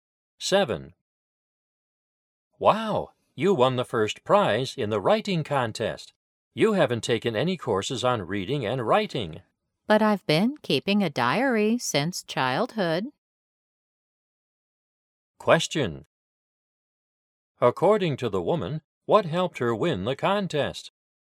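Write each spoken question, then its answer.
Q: According to the woman, what helped her win the contest?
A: Keeping a diary since childhood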